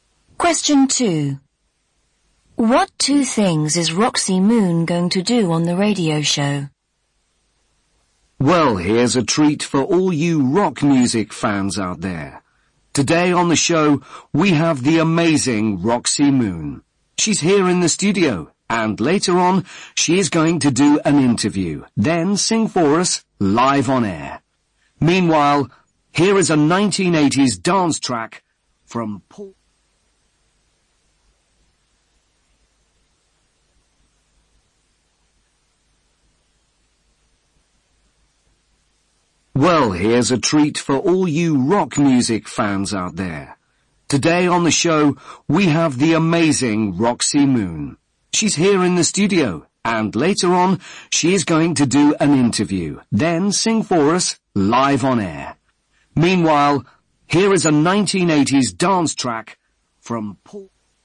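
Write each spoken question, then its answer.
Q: What two things is Roxy Moon going to do on the radio show?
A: Do an interview and sing live on air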